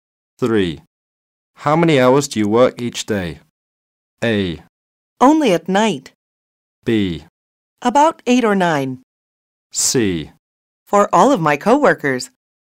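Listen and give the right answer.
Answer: B: About 8 or 9.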